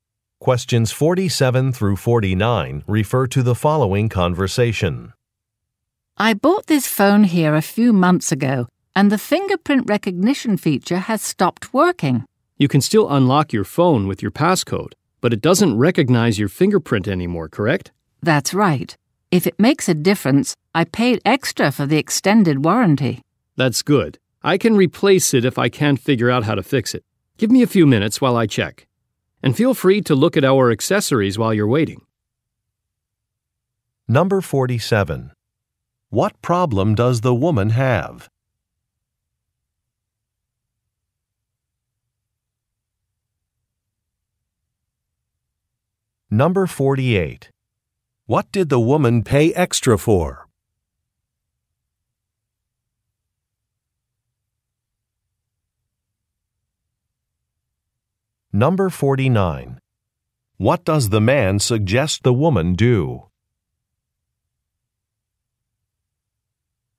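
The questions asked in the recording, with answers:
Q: What problem does the woman have?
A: The fingerprint recognition feature on her phone has stopped working

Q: What did the woman pay extra for?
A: An extended warranty

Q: What does the man suggest the woman do?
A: Look at the accessories while she waits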